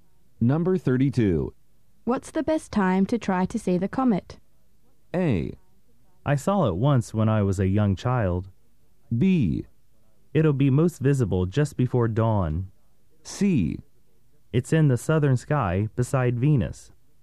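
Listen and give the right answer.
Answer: B: It'll be most visible just before dawn.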